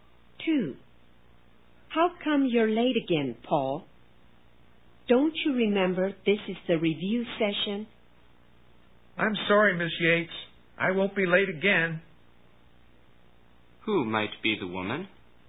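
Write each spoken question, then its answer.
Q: Who might be the woman?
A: Paul's teacher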